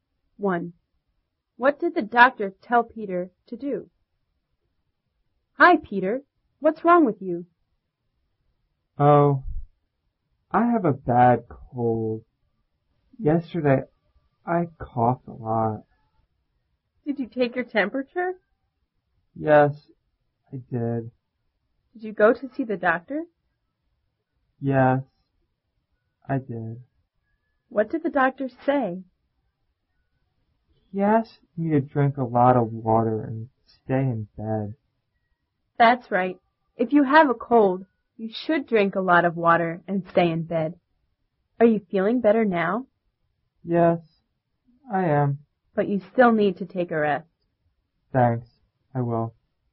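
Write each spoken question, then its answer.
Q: What did the doctor tell Peter to do?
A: Drink a lot of water and stay in bed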